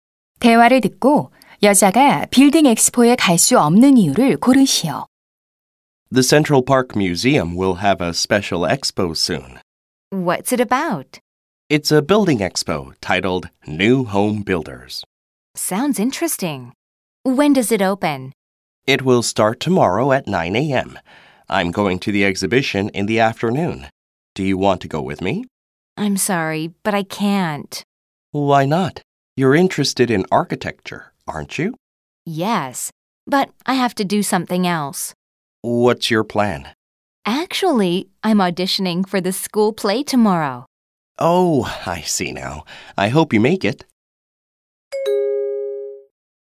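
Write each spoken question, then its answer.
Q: 대화를 듣고 여자가 빌딩 엑스포에 갈 수 없는 이유를 고르시오.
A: 학교 연극 오디션을 봐야 해서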